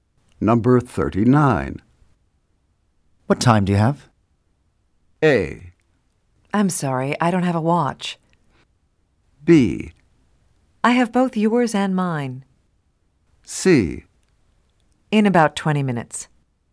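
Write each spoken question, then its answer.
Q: What time do you have?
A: A: I'm sorry, I don't have a watch.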